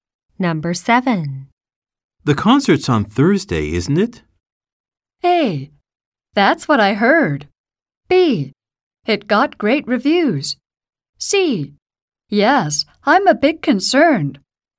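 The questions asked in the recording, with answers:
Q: The concert's on Thursday, isn't it?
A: A: That's what I heard.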